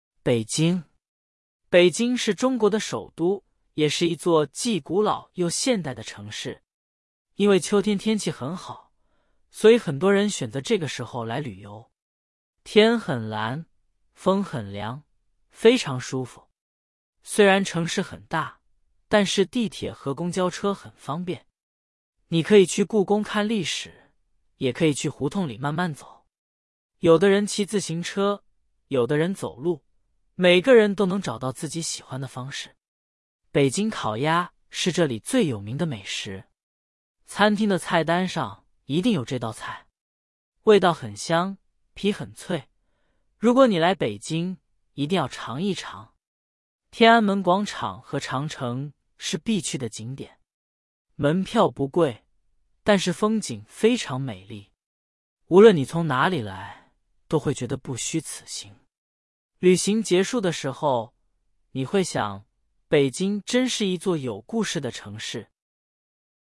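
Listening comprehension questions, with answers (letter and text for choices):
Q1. 北京是中国的什么?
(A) 首都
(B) 城市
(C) 景点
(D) 美食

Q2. 秋天的天气怎么样?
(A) 很热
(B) 很冷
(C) 很好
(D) 很坏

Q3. 在北京,什么交通工具很方便?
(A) 飞机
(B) 地铁和公交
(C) 出租车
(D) 自行车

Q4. 北京烤鸭的皮怎么样?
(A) 很软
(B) 很硬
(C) 很脆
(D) 很甜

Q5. 天安门广场和长城是什么?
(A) 美食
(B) 景点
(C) 城市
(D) 交通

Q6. 无论你从哪里来,都会觉得怎么样?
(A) 很累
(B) 不虚此行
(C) 很贵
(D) 很冷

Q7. 北京是一座只有古老的城市。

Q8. 秋天的北京天气很舒服。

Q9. 在北京,你只能坐地铁。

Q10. 北京烤鸭是北京最有名的美食。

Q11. 天安门广场和长城的门票很贵。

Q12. 旅行结束的时候,你会觉得北京是一座有故事的城市。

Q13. 北京是什么国家的首都?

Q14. 为什么很多人选择秋天来北京旅游?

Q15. 在北京,你可以坐什么交通工具?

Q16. 北京最有名的美食是什么?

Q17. 旅行结束的时候,你会想什么?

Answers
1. (A) 首都
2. (C) 很好
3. (B) 地铁和公交
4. (C) 很脆
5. (B) 景点
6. (B) 不虚此行
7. 错
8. 对
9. 错
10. 对
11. 错
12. 对
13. 中国
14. 因为秋天天气很好
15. 地铁和公交车
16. 北京烤鸭
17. 北京真是一座有故事的城市

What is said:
北京
北京是中国的首都,也是一座既古老又现代的城市。因为秋天天气很好,所以很多人选择这个时候来旅游。天很蓝,风很凉,非常舒服。
虽然城市很大,但是地铁和公交车很方便。你可以去故宫看历史,也可以去胡同里慢慢走。有的人骑自行车,有的人走路,每个人都能找到自己喜欢的方式。
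北京烤鸭是这里最有名的美食。餐厅的菜单上一定有这道菜。味道很香,皮很脆,如果你来北京,一定要尝一尝。
天安门广场和长城是必去的景点。门票不贵,但是风景非常美丽。无论你从哪里来,都会觉得不虚此行。旅行结束的时候,你会想:北京真是一座有故事的城市。

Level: HSK3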